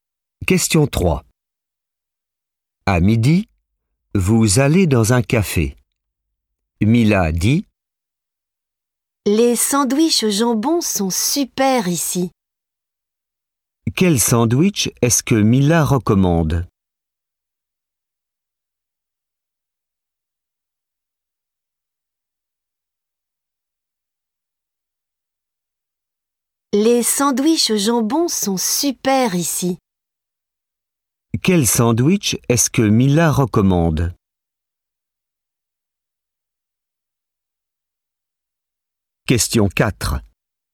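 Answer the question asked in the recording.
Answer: Le sandwich au jambon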